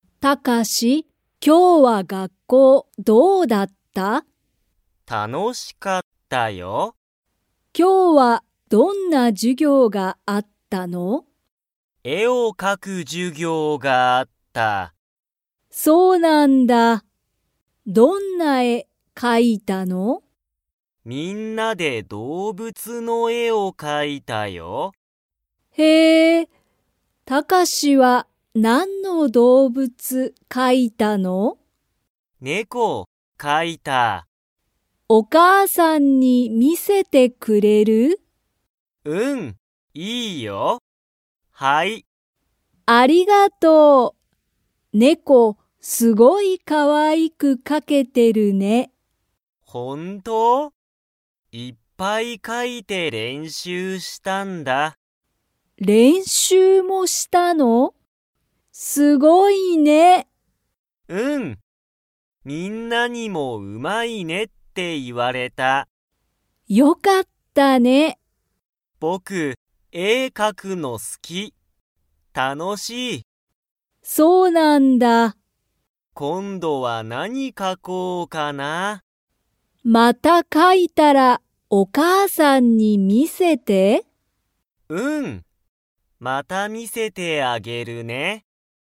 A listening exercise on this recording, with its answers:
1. タカシは、何なんの絵えを描かきましたか?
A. 犬いぬ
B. 猫ねこ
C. 花はな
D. お母かあさん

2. タカシは、絵えを描かくのが 。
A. 好すきだ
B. 好すきじゃない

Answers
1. B
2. A

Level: Level 3

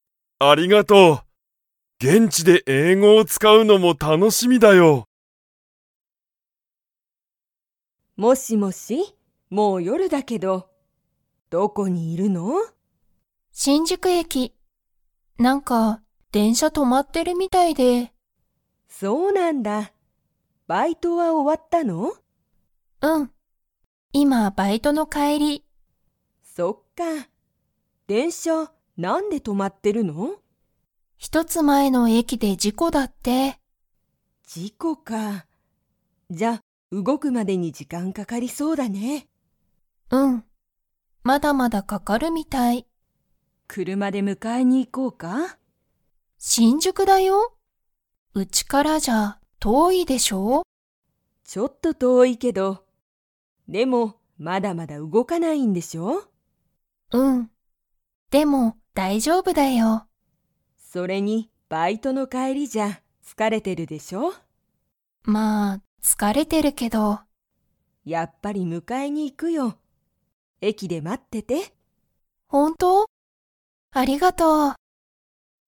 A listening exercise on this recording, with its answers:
Comprehension Quiz (Skip if you don't understand the conversation yet)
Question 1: 娘むすめは、今いまどこにいますか?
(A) 車くるまの中なか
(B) 電車でんしゃの中なか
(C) 新宿しんじゅく駅えき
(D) 家いえ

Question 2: 母ははは娘むすめを迎むかえに 。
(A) 行いく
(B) 行いかない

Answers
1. C
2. A

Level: Level 4

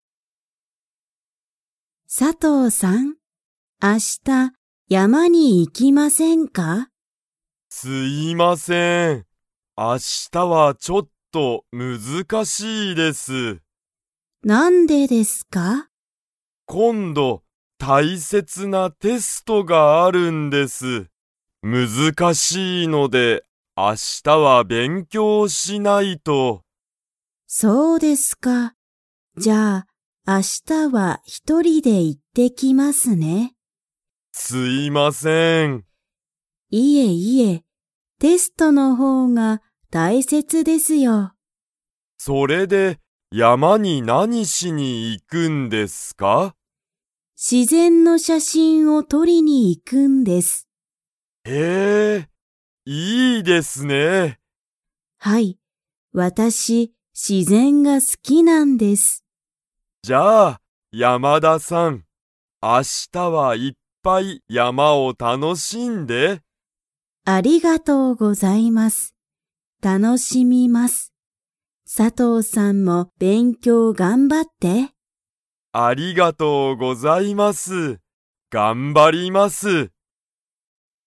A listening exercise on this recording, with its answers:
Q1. 佐藤(さとう)さんは、明日山(あしたやま)に行(い)きますか?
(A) はい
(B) いいえ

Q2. 山田(やまだ)さんは____が好(す)きだ。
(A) 仕事(しごと)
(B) 自然(しぜん)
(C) 勉強(べんきょう)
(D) テスト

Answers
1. B
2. B

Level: Level 2

